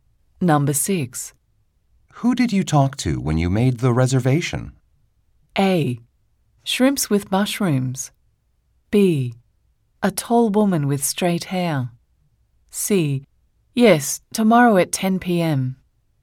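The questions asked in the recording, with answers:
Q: Who did you talk to when you made the reservation?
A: B: A tall woman with straight hair.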